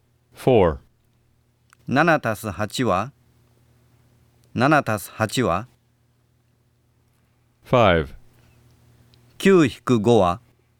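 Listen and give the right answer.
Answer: 15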